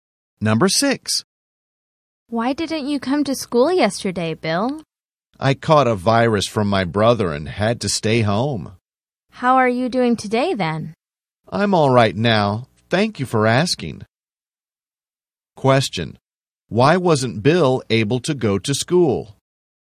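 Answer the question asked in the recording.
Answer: He caught a virus from his brother.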